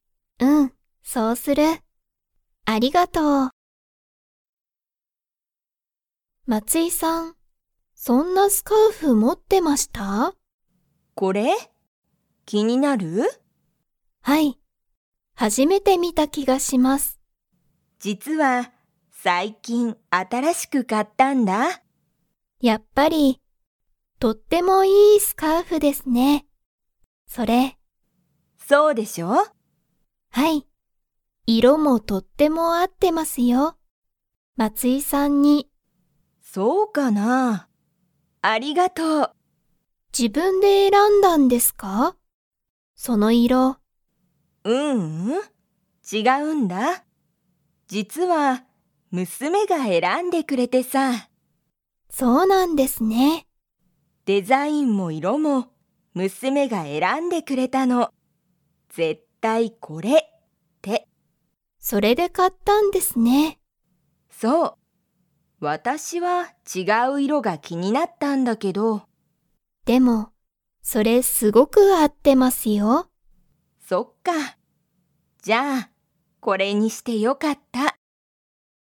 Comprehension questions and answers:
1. 松井まついさんは、そのスカーフをずっと前まえから持もってますか?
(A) はい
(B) いいえ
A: (B) いいえ

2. 松井まついさんのスカーフは、 が選えらんでくれた。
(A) お母かあさん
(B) 娘むすめ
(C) お父とうさん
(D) 息子むすこ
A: (B) 娘むすめ

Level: Level 3

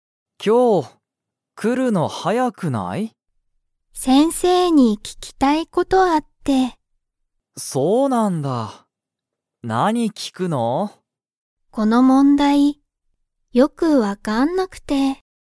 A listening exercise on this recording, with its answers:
Comprehension Quiz (Skip if you don't understand the conversation yet)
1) リカは、____に聞ききたい事ことがある。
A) 先生せんせい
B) 家族かぞく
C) ナオキ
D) 友達ともだち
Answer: A) 先生せんせい

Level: Level 1

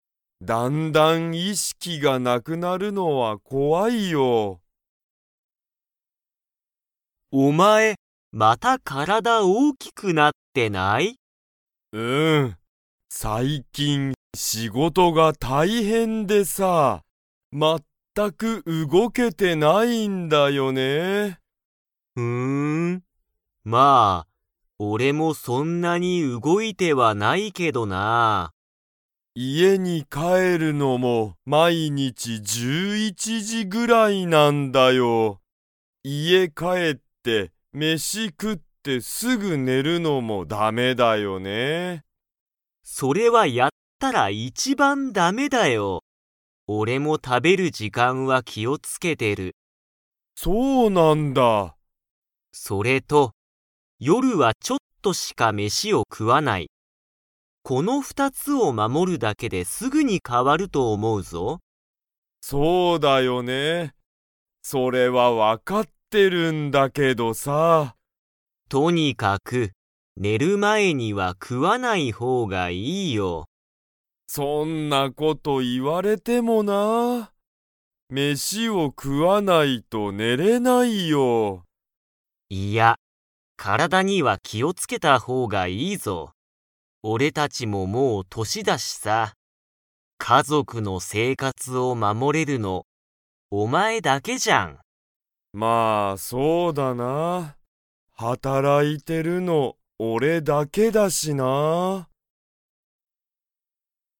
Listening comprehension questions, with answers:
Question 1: ヨシキは、毎日まいにち何時なんじくらいに家いえに帰かえりますか?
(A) 8時じ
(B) 9時じ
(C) 10時じ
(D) 11時じ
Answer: (D) 11時じ

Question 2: マサトは、夜よるは飯めしを 。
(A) いっぱい食くう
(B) ちょっとしか食くわない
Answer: (B) ちょっとしか食くわない

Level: Level 3

